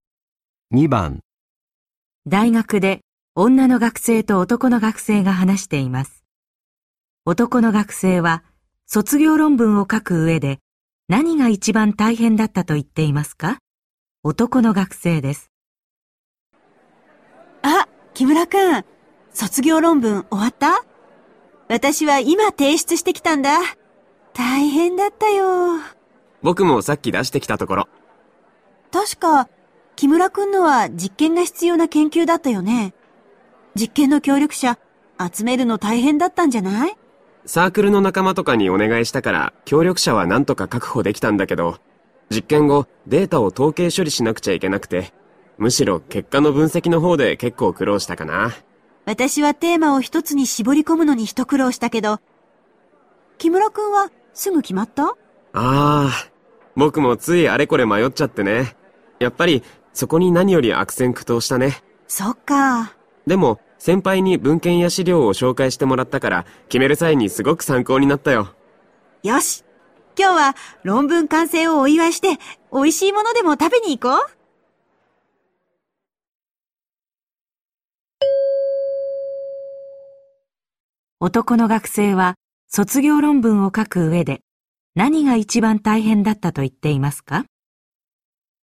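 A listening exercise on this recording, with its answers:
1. 男の学生は卒業論文を書くうえで、何が一番たいへんだったと言っていますか。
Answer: テーマを一つに絞り込むこと

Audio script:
A:あっ、木村くん、卒業論文、終わった?私は今提出してきたんだあ。大変だったよ。
B:僕もさっき出してきたところ。
A:確か、木村くんのは実験が必要な研究だったよね。実験の協力者、集めるの大変だったんじゃない。
B:サークルの仲間とかにお願いしたから、協力者は何とか確保できたんだけど、実験後、データを統計処理しなくちゃいけなくて、むしろ結果の分析のほうでけっこう苦労したかなぁ。
A:私はテーマを一つに絞り込むのに一苦労したけど、木村くんは、すぐ決まった?
B:ああ、僕もついあれこれ迷っちゃってね。やっぱり、そこに何より悪戦苦闘したね。
A:そうか。
B:でも、先輩に文献や資料を紹介してもらったから、決める際に、すごく参考になったよ。
A:よし、今日は論文完成をお祝いして、おいしい物でも食べに行こう?

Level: N1级别听力题库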